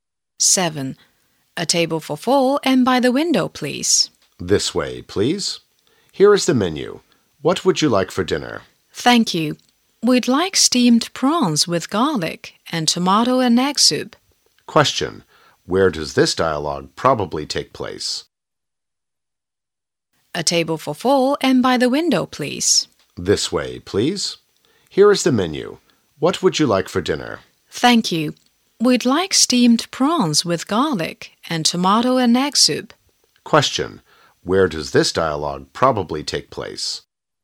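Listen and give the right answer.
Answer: In a restaurant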